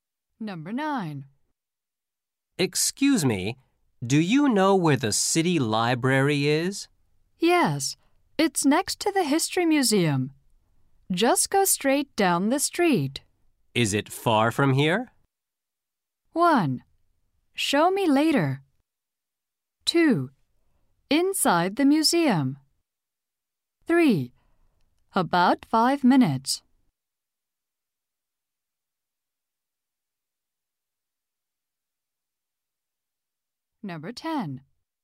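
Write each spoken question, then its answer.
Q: Is it far from here?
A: 3: About 5 minutes.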